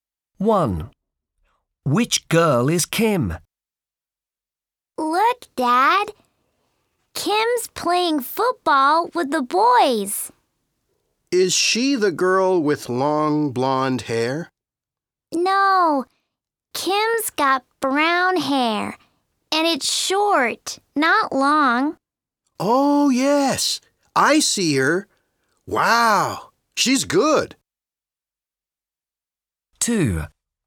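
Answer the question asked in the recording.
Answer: The girl with short brown hair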